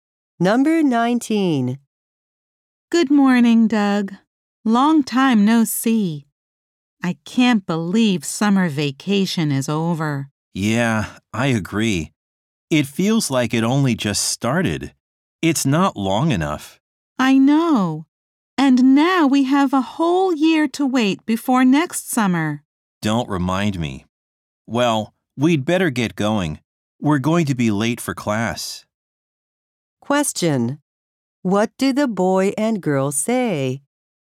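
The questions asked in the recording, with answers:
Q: What do the boy and girl say?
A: Summer vacation was too short.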